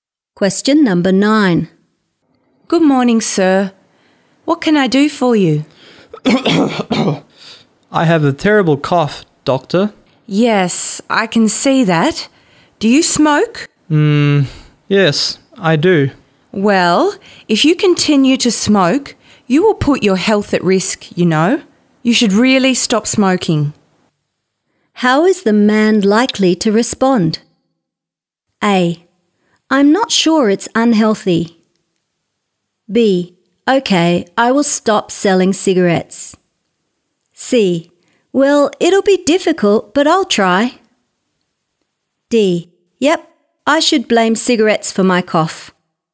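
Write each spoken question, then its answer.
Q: How is the man likely to respond?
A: C: Well, it'll be difficult, but I'll try.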